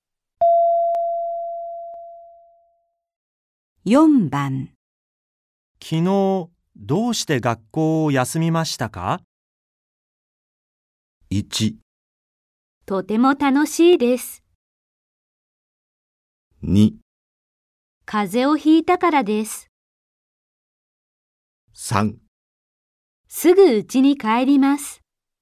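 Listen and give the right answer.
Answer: 2: 風邪をひいたからです。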